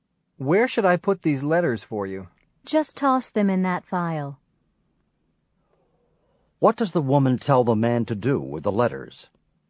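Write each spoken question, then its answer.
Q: What does the woman tell the man to do with the letters?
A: Put them in the file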